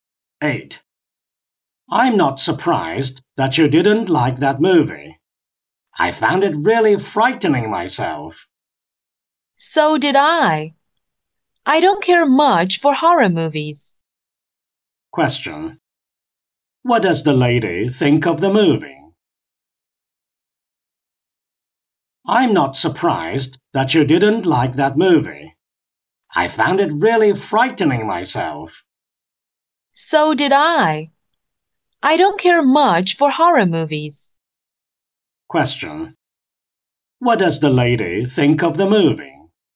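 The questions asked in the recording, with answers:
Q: What does the lady think of the movie?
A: It was frightening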